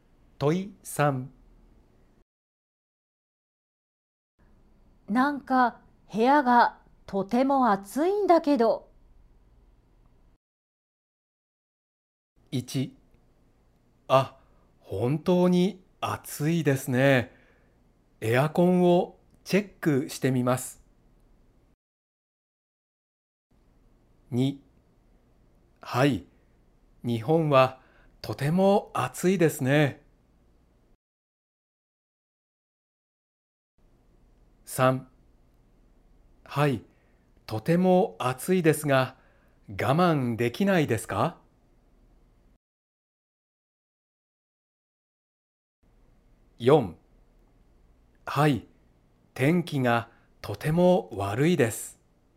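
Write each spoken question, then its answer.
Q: なんか部屋がとても暑いんだけど。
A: 1: あ、本当に暑いですね。エアコンをチェックしてみます。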